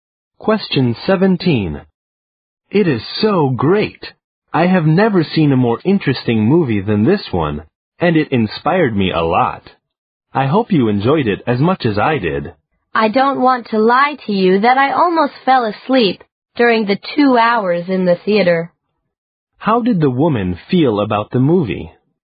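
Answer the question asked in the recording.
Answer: She found it boring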